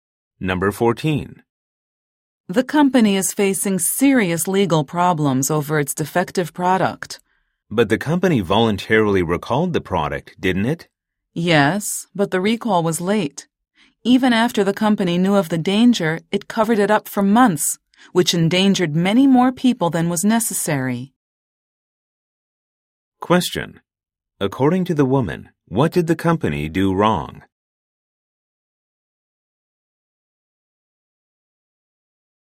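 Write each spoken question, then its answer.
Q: According to the woman, what did the company do wrong?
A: It covered up the danger for months and recalled the product late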